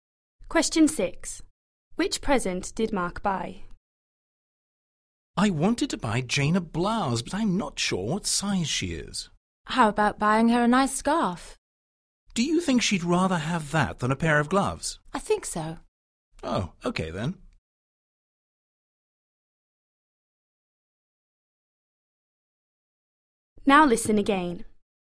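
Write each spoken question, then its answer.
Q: Which present did Mark buy?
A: A scarf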